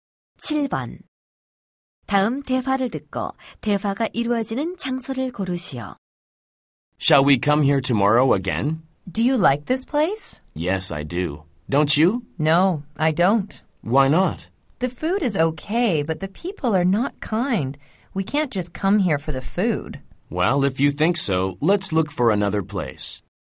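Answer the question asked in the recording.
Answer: 식당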